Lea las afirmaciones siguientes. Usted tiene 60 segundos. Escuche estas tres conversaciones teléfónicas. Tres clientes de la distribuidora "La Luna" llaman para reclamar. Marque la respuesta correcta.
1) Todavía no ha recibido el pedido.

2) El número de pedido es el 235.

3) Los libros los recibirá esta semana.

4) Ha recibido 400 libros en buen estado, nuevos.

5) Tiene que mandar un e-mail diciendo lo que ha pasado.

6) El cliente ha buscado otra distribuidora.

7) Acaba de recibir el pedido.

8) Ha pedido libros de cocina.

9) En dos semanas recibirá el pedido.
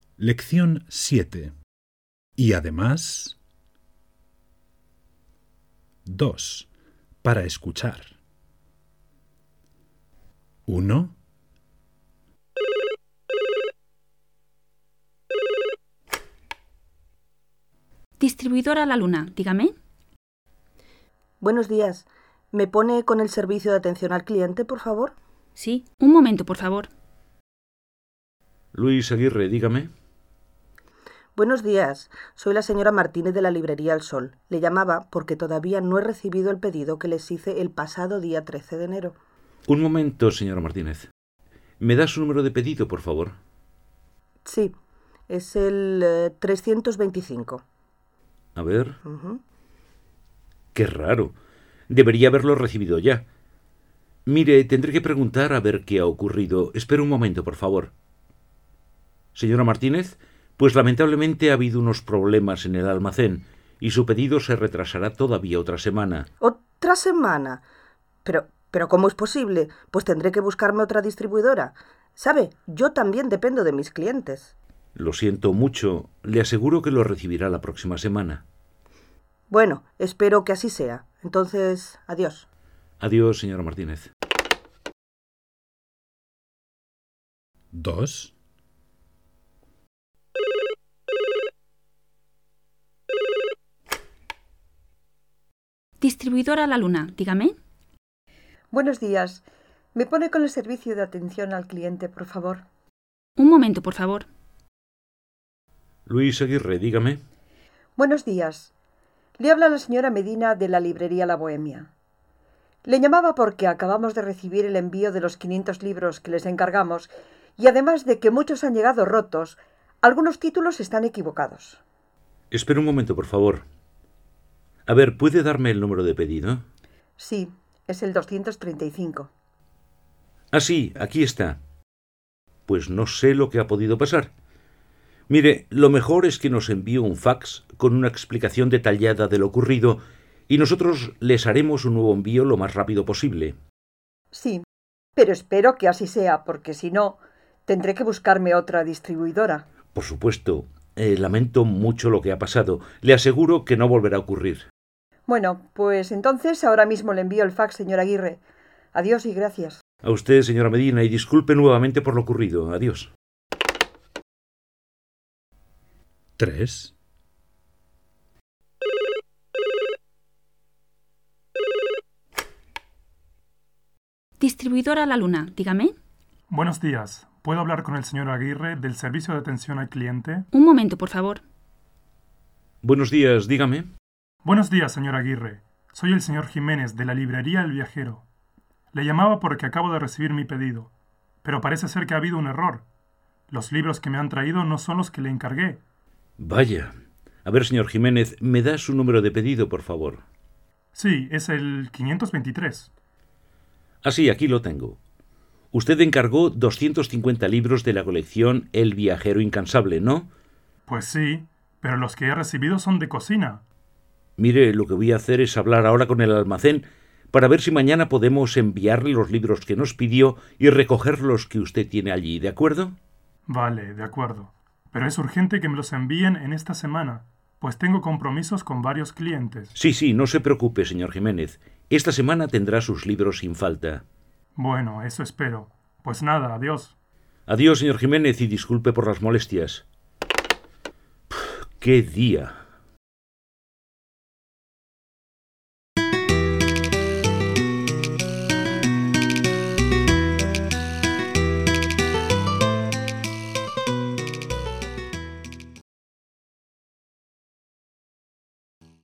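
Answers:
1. correcto
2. falso
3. falso
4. falso
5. falso
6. falso
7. correcto
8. falso
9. falso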